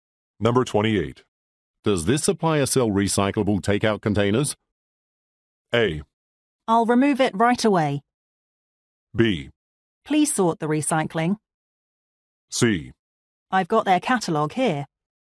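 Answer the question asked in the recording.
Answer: C: I've got their catalog here.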